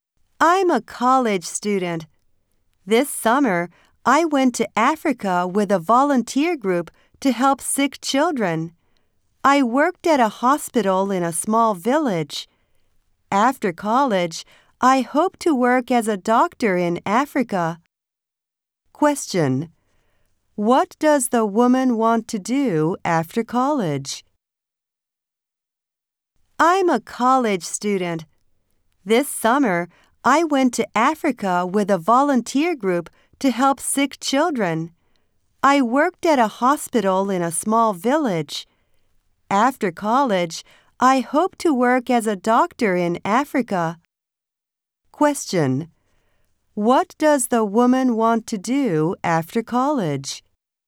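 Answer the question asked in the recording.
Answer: Work as a doctor in Africa.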